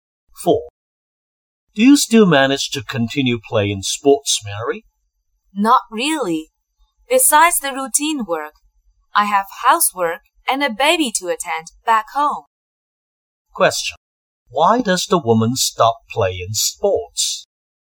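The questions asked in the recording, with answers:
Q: Why does the woman stop playing sports?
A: She is too busy with work, housework and a baby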